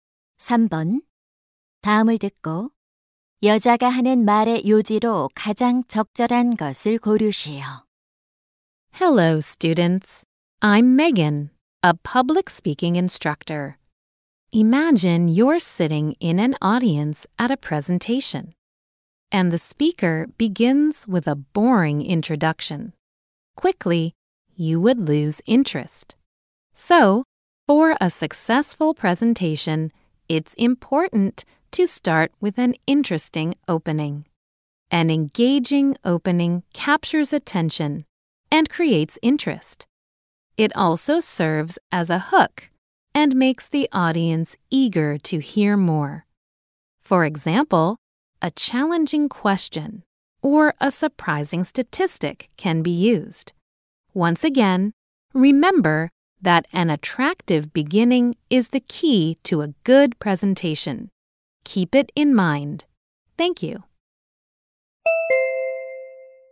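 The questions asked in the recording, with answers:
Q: 다음을 듣고 여자가 하는 말의 요지로 가장 적절한 것을 고르시오.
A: 성공적인 발표를 위해서는 흥미로운 도입부가 중요하다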